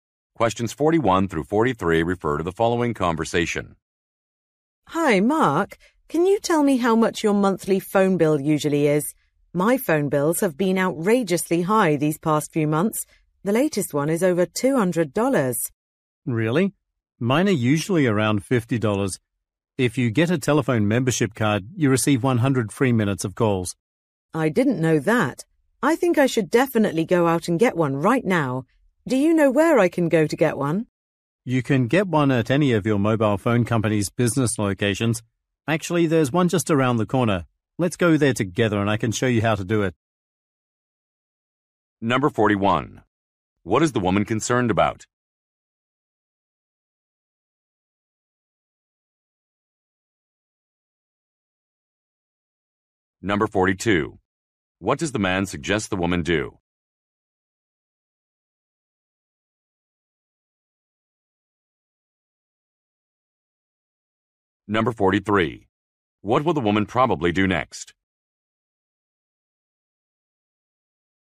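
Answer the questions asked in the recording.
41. Her high phone bills
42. Get a telephone membership card
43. Go to a phone company location with the man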